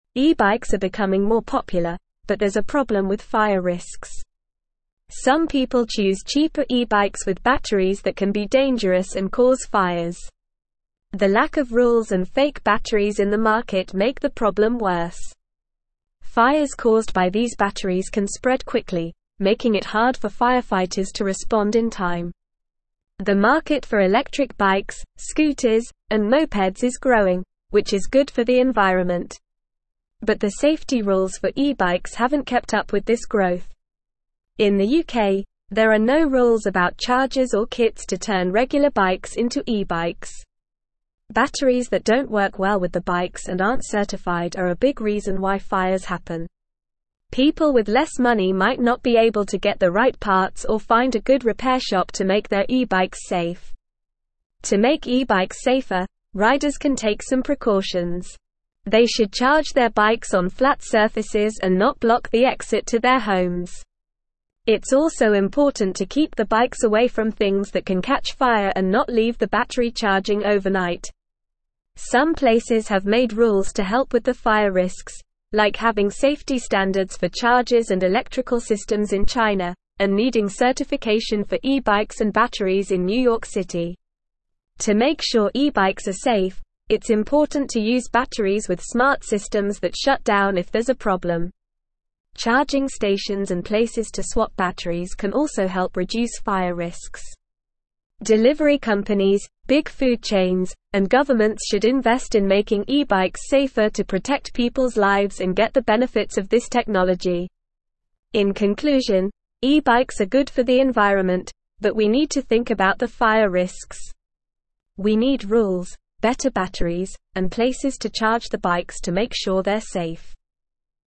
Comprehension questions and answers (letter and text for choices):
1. What is the main problem with some cheaper e-bikes?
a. They are not good for the environment.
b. They have batteries that can be dangerous and cause fires.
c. They are difficult to ride.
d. They are too expensive.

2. What is one reason why some people might not be able to make their e-bikes safe?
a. They don't know how to ride a bike.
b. They don't have access to a flat surface to charge their bikes.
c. They don't have a safe place to store their bikes.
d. They don't have enough money to get the right parts or find a good repair shop.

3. What precautions can riders take to make their e-bikes safer?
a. Block the exit to their homes when charging their bikes.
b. Leave the battery charging overnight.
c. Use uncertified batteries.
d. Charge their bikes on flat surfaces and keep them away from things that can catch fire.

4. What safety standards have been implemented in China to help with the fire risks of e-bikes?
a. Certification for e-bikes and batteries.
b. Charging stations and battery swapping places.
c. Safety standards for chargers and electrical systems.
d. None of the above.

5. Who should invest in making e-bikes safer?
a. Only the government.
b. Delivery companies, big food chains, and governments.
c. Only the riders of e-bikes.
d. Only the manufacturers of e-bikes.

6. What is the main conclusion of the article?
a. E-bikes are too expensive and not worth the investment.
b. E-bikes are not good for the environment and should be banned.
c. E-bikes are good for the environment, but we need to think about the fire risks and make them safer.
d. E-bikes are safe and do not pose any fire risks.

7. What is one thing that needs to be done to make e-bikes safer?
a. Use batteries with smart systems that shut down if there's a problem.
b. Ban the use of e-bikes altogether.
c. Increase the price of e-bikes to ensure better quality.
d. Only allow certified repair shops to work on e-bikes.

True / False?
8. People with limited financial resources may easily obtain the correct parts or find a reliable repair shop to ensure the safety of their e-bikes.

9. Batteries that are not certified and do not work well with e-bikes are a major cause of fires.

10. The lack of regulations and the presence of fake batteries in the market worsen the problem of e-bike fires.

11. In the UK, there are regulations regarding chargers and kits to convert regular bikes into e-bikes.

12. Precautions such as charging e-bikes on slanted surfaces, placing them near flammable objects, and doing overnight charging can help make them riskier.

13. The safety rules for e-bikes have kept up with the growth of the market for electric bikes, scooters, and mopeds.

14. The popularity of e-bikes is increasing, but there is a problem with fire risks associated with cheaper models.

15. Fires caused by e-bike batteries can spread quickly, making it difficult for firefighters to respond in time.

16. E-(1)______ are becoming more popular, but there's a (2)______ with fire risks.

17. E-(1)______ are becoming more popular, but there's a (2)______ with fire risks.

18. Some people choose cheaper e-bikes with batteries that can be dangerous and cause (3)______.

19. Fires caused by these batteries can spread quickly, making it hard for (4)______ to respond in time.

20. Batteries that don't work well with the bikes and aren't (5)______ are a big reason why fires happen.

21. People with less money might not be able to get the (6)______ parts or find a good (7)______ shop to make their e-bikes safe.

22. People with less money might not be able to get the (6)______ parts or find a good (7)______ shop to make their e-bikes safe.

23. To make e-bikes safer, (8)______ can take some precautions.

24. It's also important to keep the bikes away from things that can catch fire and not leave the battery (9)______ overnight.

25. Some (10)______ have made rules to help with the fire risks, like (11)______ safety standards for chargers and (12)______ systems in China, and needing certification for e-bikes and batteries in New York City.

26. Some (10)______ have made rules to help with the fire risks, like (11)______ safety standards for chargers and (12)______ systems in China, and needing certification for e-bikes and batteries in New York City.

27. Some (10)______ have made rules to help with the fire risks, like (11)______ safety standards for chargers and (12)______ systems in China, and needing certification for e-bikes and batteries in New York City.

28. Delivery companies, big food chains, and governments should invest in making e-bikes safer to protect people's (13)______ and get the benefits of this technology.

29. In conclusion, e-bikes are good for the (14)______, but we need to think about the fire risks.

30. We need rules, (15)______ batteries, and places to (16)______ the bikes to make sure they're safe.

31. We need rules, (15)______ batteries, and places to (16)______ the bikes to make sure they're safe.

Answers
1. b. They have batteries that can be dangerous and cause fires.
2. d. They don't have enough money to get the right parts or find a good repair shop.
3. d. Charge their bikes on flat surfaces and keep them away from things that can catch fire.
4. c. Safety standards for chargers and electrical systems.
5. b. Delivery companies, big food chains, and governments.
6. c. E-bikes are good for the environment, but we need to think about the fire risks and make them safer.
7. a. Use batteries with smart systems that shut down if there's a problem.
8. False
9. True
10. True
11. False
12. False
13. False
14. True
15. True
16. bikes
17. problem
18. fires
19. firefighters
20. certified
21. right
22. repair
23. riders
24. charging
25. places
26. having
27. electrical
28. lives
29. environment
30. better
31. charge

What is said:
E-bikes are becoming more popular, but there's a problem with fire risks. Some people choose cheaper e-bikes with batteries that can be dangerous and cause fires. The lack of rules and fake batteries in the market make the problem worse. Fires caused by these batteries can spread quickly, making it hard for firefighters to respond in time.
The market for electric bikes, scooters, and mopeds is growing, which is good for the environment. But the safety rules for e-bikes haven't kept up with this growth. In the UK, there are no rules about chargers or kits to turn regular bikes into e-bikes. Batteries that don't work well with the bikes and aren't certified are a big reason why fires happen. People with less money might not be able to get the right parts or find a good repair shop to make their e-bikes safe.
To make e-bikes safer, riders can take some precautions. They should charge their bikes on flat surfaces and not block the exit to their homes. It's also important to keep the bikes away from things that can catch fire and not leave the battery charging overnight. Some places have made rules to help with the fire risks, like having safety standards for chargers and electrical systems in China, and needing certification for e-bikes and batteries in New York City.
To make sure e-bikes are safe, it's important to use batteries with smart systems that shut down if there's a problem. Charging stations and places to swap batteries can also help reduce fire risks. Delivery companies, big food chains, and governments should invest in making e-bikes safer to protect people's lives and get the benefits of this technology.
In conclusion, e-bikes are good for the environment, but we need to think about the fire risks. We need rules, better batteries, and places to charge the bikes to make sure they're safe.

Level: Level 3